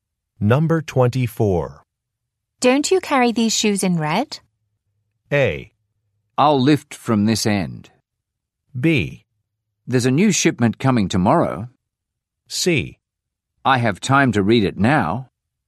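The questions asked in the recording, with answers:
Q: Don't you carry these shoes in red?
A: B: There's a new shipment coming tomorrow.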